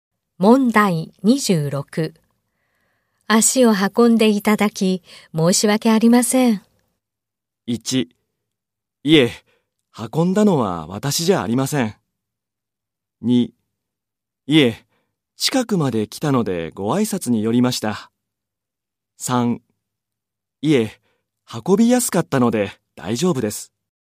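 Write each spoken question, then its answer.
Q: 足を運んでいただき、申し訳ありません。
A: 2: いえ、近くまで来たのでご挨拶に寄りました。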